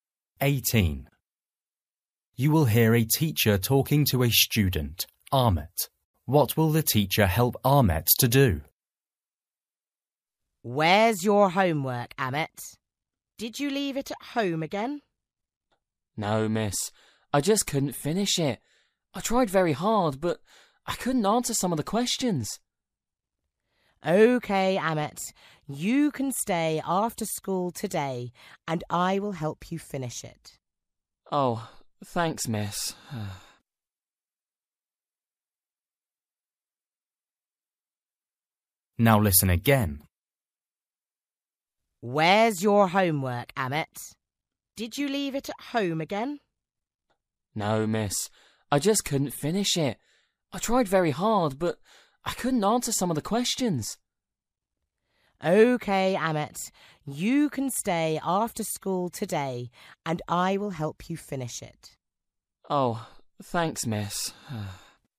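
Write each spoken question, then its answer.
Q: What will the teacher help Ahmet to do?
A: Finish his homework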